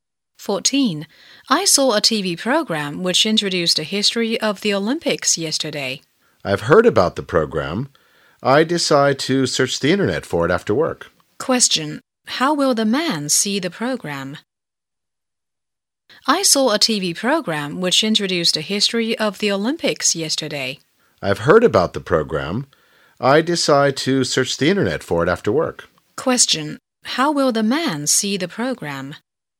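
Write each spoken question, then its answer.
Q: How will the man see the program?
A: By searching the internet for it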